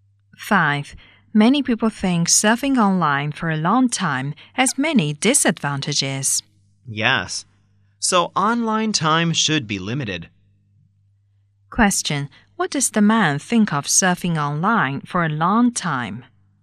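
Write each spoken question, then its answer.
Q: What does the man think of surfing online for a long time?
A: It has many disadvantages, so online time should be limited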